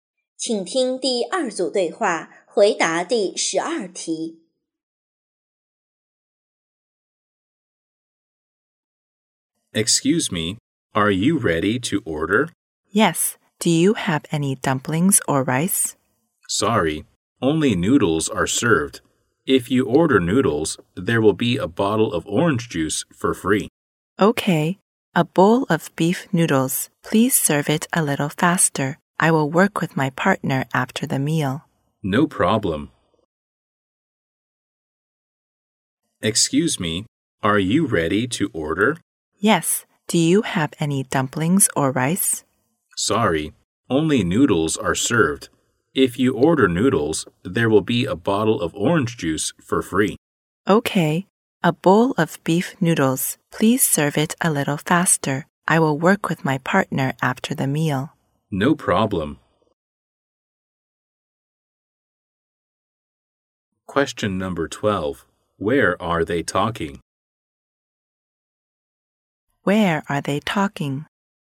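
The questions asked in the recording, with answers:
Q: Where are they talking?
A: In a restaurant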